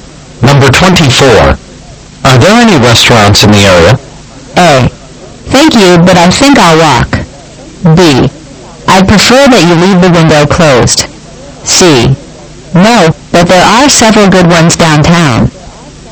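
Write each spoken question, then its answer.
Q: Are there any restaurants in the area?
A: C: No, but there are several good ones downtown.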